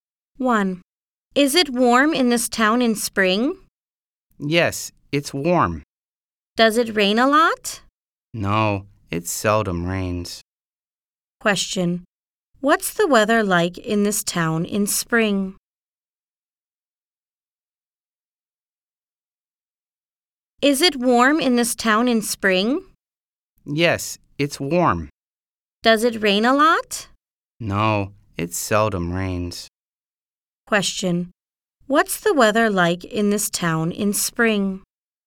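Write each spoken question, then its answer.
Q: What's the weather like in this town in spring?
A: Warm, and it seldom rains.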